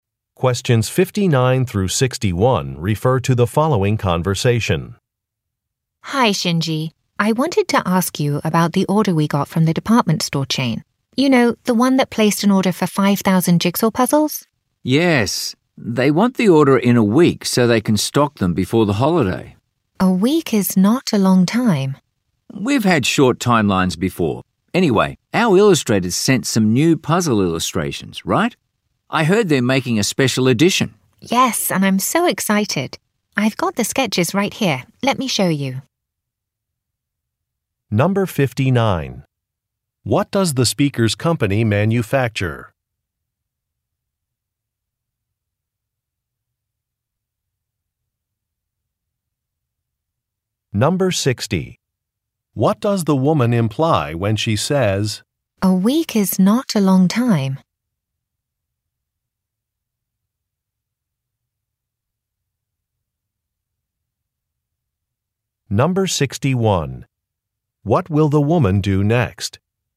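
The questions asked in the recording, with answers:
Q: What does the speaker's company manufacture?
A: Jigsaw puzzles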